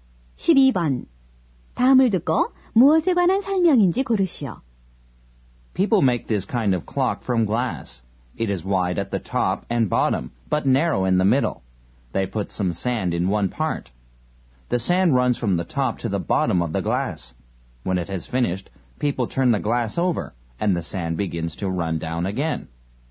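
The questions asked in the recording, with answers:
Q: 다음을 듣고 무엇에 관한 설명인지 고르시오.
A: 모래시계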